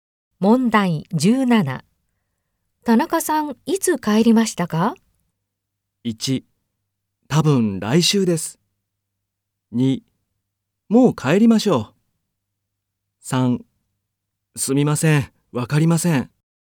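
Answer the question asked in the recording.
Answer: 3: すみません、わかりません。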